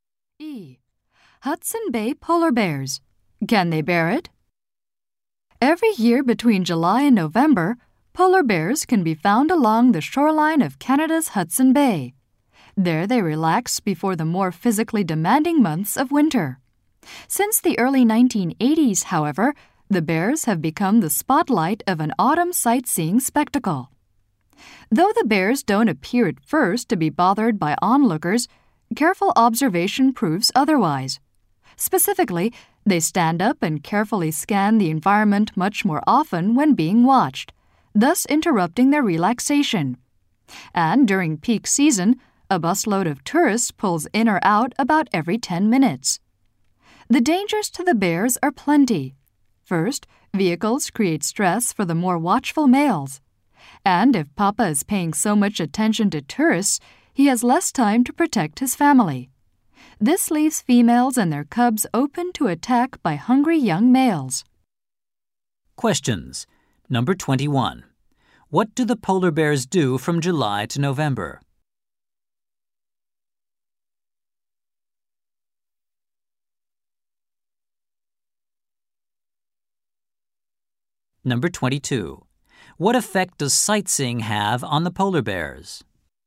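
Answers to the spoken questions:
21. Relax along the shore of Hudson Bay
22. It stresses them and interrupts their rest, leaving families vulnerable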